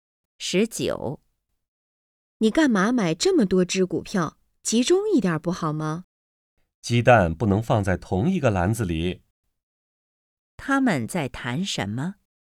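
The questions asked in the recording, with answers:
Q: 他们在谈什么?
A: 买股票(分散投资)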